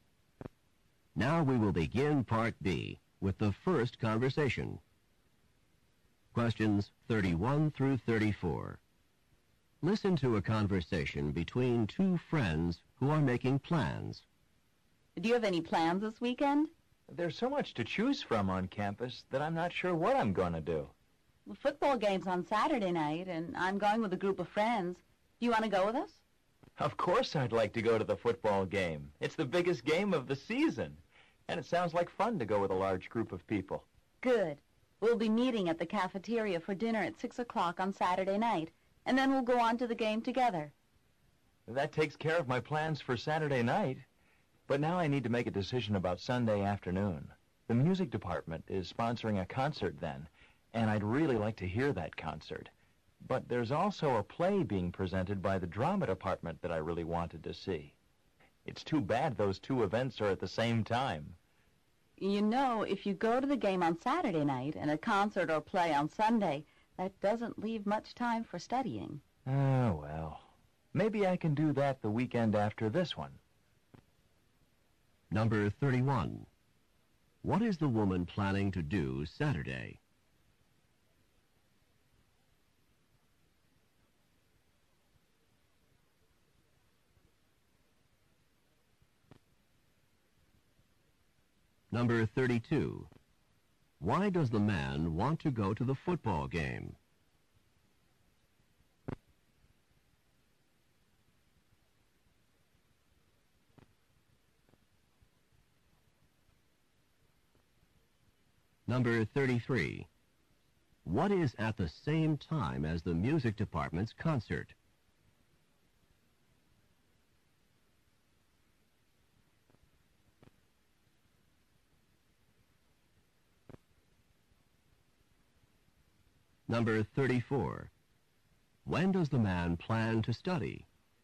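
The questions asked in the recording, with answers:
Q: Why does the man want to go to the football game?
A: It's the biggest game of the season and it sounds fun to go with a large group

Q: What is at the same time as the music department's concert?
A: A play presented by the drama department

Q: When does the man plan to study?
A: The weekend after this one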